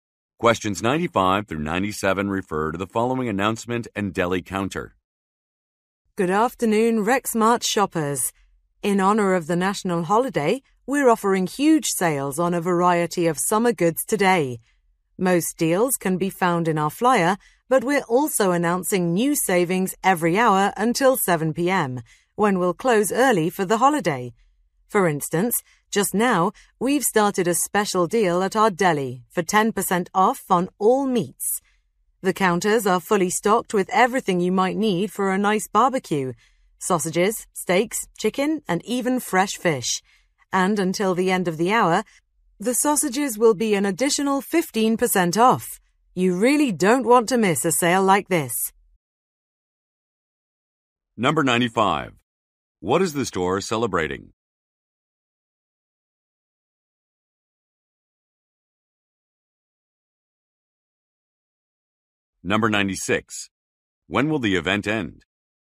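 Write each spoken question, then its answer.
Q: What is the store celebrating?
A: A national holiday

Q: When will the event end?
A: At 7 p.m.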